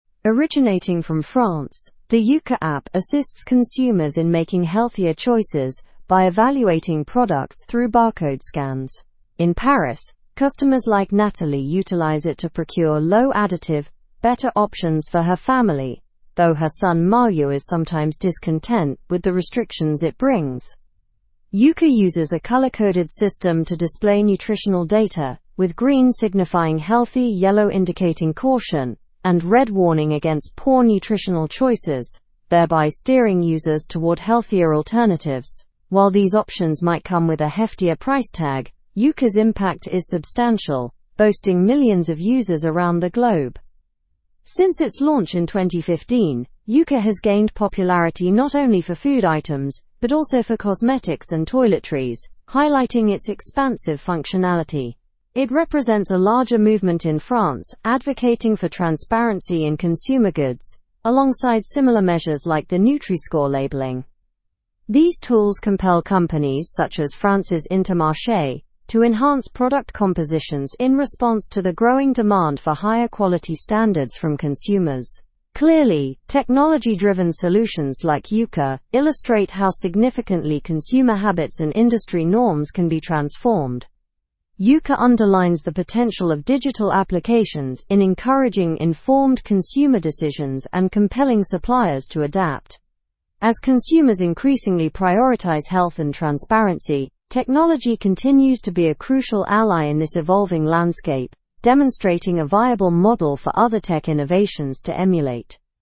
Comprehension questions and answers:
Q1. What is the primary function of the Yuka app?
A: It helps consumers make healthier choices by evaluating products through barcode scans.

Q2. How does Yuka guide consumers toward healthier options?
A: By using a color-coded system indicating green for healthy, yellow for caution, and red for poor nutrition.

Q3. Besides food, what types of products does Yuka evaluate?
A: Cosmetics and toiletries.

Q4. What broader movement does Yuka represent in France?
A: Transparency in food production.

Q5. What impact has Yuka had on companies like Intermarché?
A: It has led them to improve their product formulations.

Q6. Why might some users be dissatisfied with Yuka's suggestions?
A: Some, like Malo, might not be thrilled with the limits Yuka imposes on product choices.

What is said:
Originating from France, the Yuka app assists consumers in making healthier choices by evaluating products through barcode scans. In Paris, customers like Nathalie utilize it to procure low-additive, better options for her family, though her son Malo is sometimes discontent with the restrictions it brings.
Yuka uses a color-coded system to display nutritional data, with green signifying healthy, yellow indicating caution, and red warning against poor nutritional choices, thereby steering users toward healthier alternatives. While these options might come with a heftier price tag, Yuka's impact is substantial, boasting millions of users around the globe.
Since its launch in 2015, Yuka has gained popularity not only for food items but also for cosmetics and toiletries, highlighting its expansive functionality. It represents a larger movement in France advocating for transparency in consumer goods, alongside similar measures like the Nutri-Score labeling.
These tools compel companies, such as France's Intermarché, to enhance product compositions in response to the growing demand for higher quality standards from consumers. Clearly, technology-driven solutions like Yuka illustrate how significantly consumer habits and industry norms can be transformed.
Yuka underlines the potential of digital applications in encouraging informed consumer decisions and compelling suppliers to adapt. As consumers increasingly prioritize health and transparency, technology continues to be a crucial ally in this evolving landscape, demonstrating a viable model for other tech innovations to emulate.

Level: Level 4